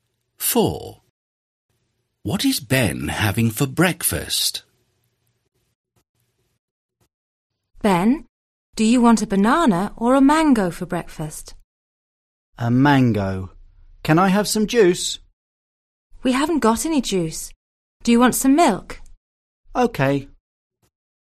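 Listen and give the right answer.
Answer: A mango and some milk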